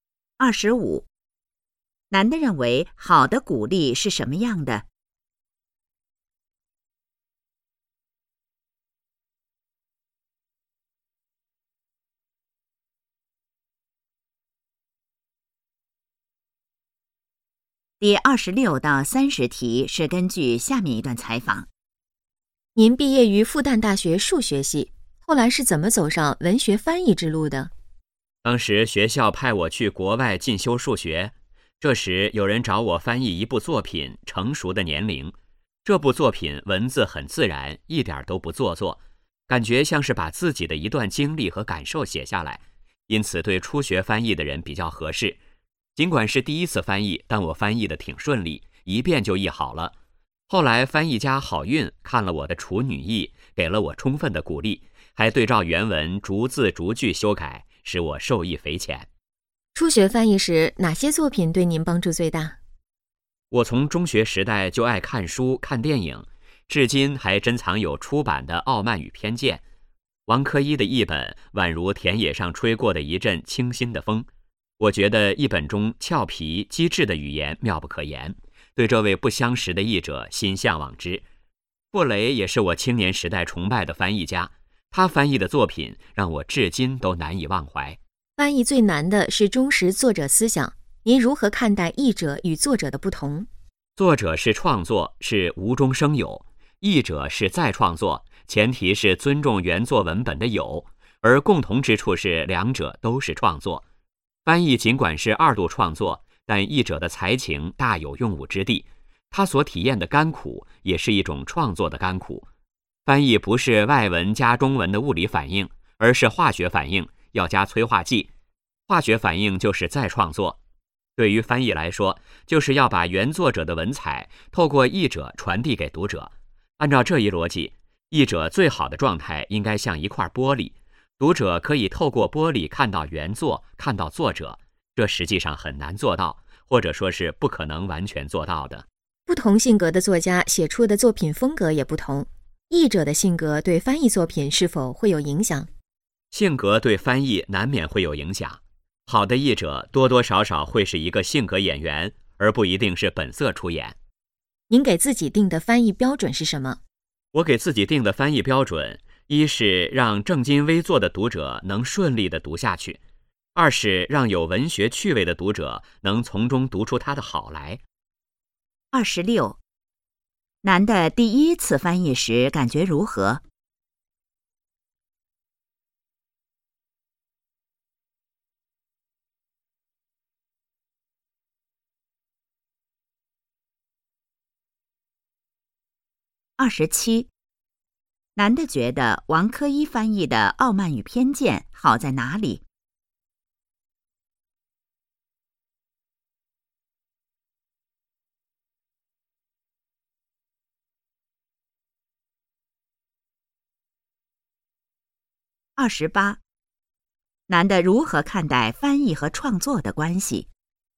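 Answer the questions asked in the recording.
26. 挺顺利
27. 语言俏皮机智
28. 两者都是创作,翻译是再创作
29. 一块玻璃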